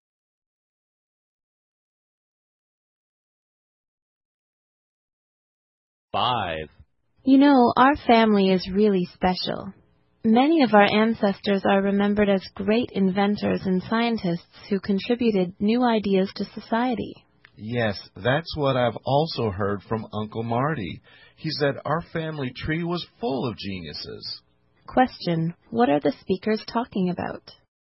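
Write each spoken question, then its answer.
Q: What are the speakers talking about?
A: Their family's ancestors, who were great inventors and scientists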